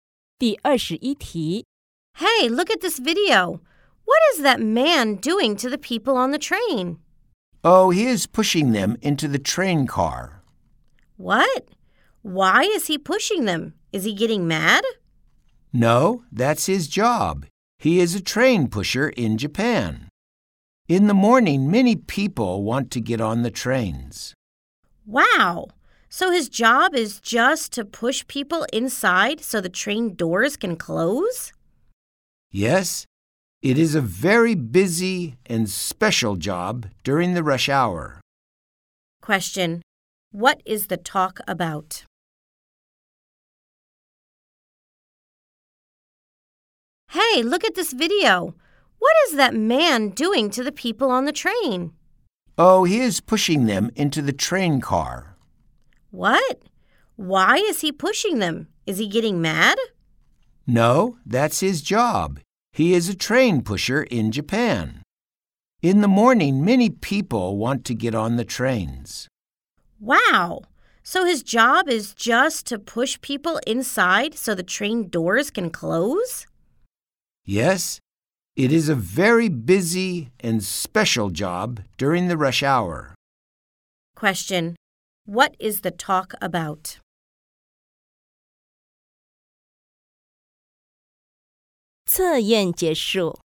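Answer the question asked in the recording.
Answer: The job of a train pusher in Japan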